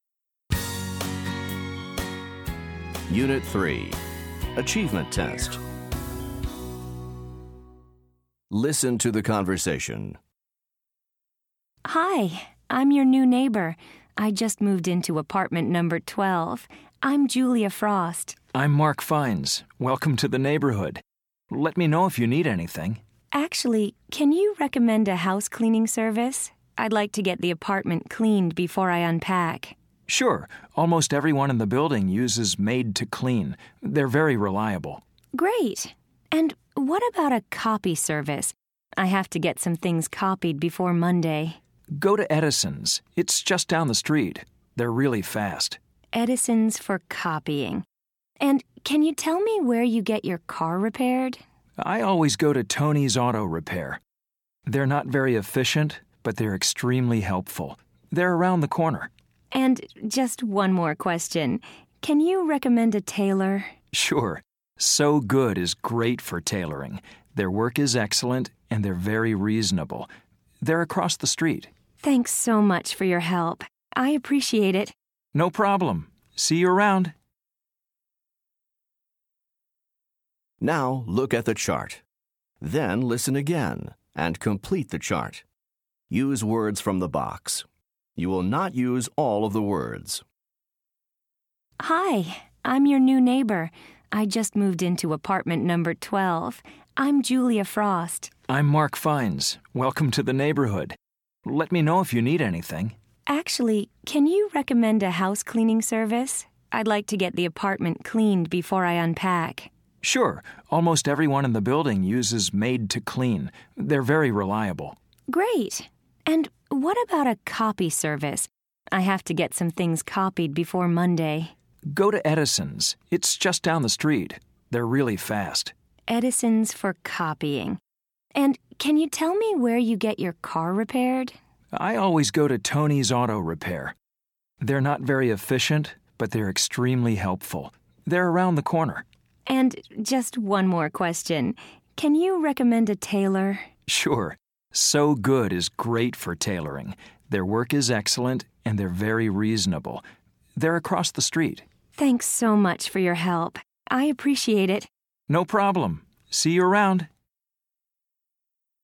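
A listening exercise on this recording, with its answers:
Listen to the conversation. Then complete the chart using words from the box. Not all the words will be used.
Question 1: Maid to Clean Example: housecleaning 1.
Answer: reliable

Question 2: Edison's 2.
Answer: copying

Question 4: Tony's 4.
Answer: car repair

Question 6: Sew Good 6.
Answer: tailoring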